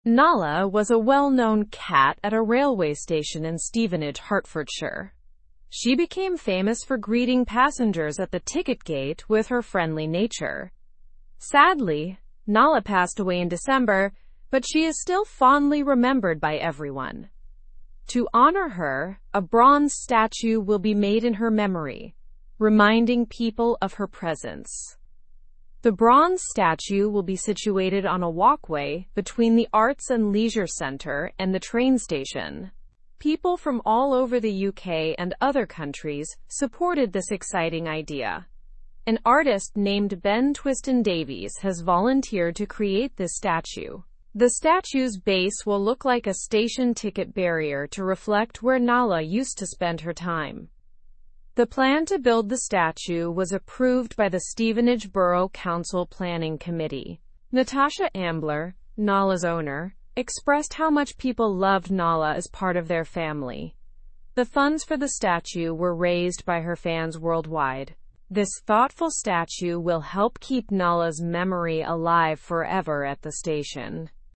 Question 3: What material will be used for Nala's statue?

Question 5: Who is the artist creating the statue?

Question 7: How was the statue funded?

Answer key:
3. Nala's statue will be made of bronze.
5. Ben Twiston-Davies is the artist creating the statue.
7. The statue was funded by fans of Nala from across the world.

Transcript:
Nala was a well-known cat at a railway station in Stevenage, Hertfordshire. She became famous for greeting passengers at the ticket gate with her friendly nature. Sadly, Nala passed away in December, but she is still fondly remembered by everyone. To honor her, a bronze statue will be made in her memory, reminding people of her presence.
The bronze statue will be situated on a walkway between the Arts and Leisure Centre and the train station. People from all over the UK and other countries supported this exciting idea. An artist named Ben Twiston-Davies has volunteered to create this statue. The statue's base will look like a station ticket barrier to reflect where Nala used to spend her time.
The plan to build the statue was approved by the Stevenage Borough Council planning committee. Natasha Ambler, Nala's owner, expressed how much people loved Nala as part of their family. The funds for the statue were raised by her fans worldwide. This thoughtful statue will help keep Nala's memory alive forever at the station.

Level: Level 2